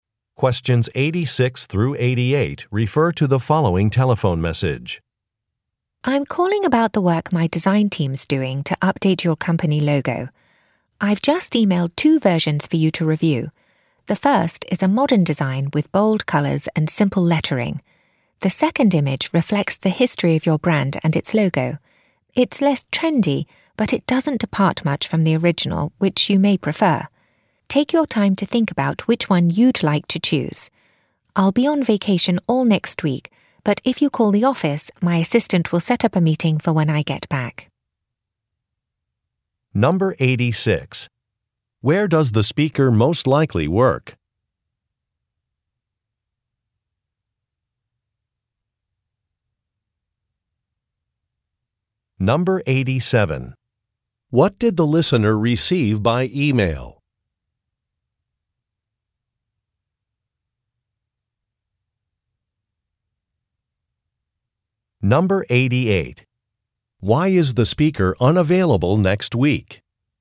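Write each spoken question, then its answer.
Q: Where does the speaker most likely work?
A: At a design firm

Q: What did the listener receive by email?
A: Two versions of an updated company logo

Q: Why is the speaker unavailable next week?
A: The speaker will be on vacation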